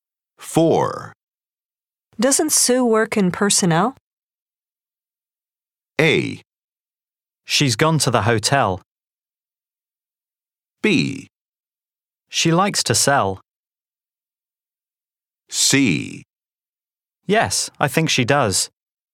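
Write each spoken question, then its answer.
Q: Doesn't Sue work in personnel?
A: C: Yes, I think she does.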